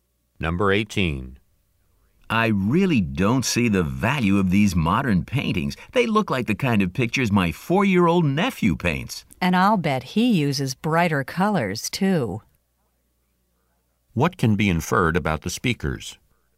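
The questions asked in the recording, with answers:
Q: What can be inferred about the speakers?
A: Neither of them likes the modern paintings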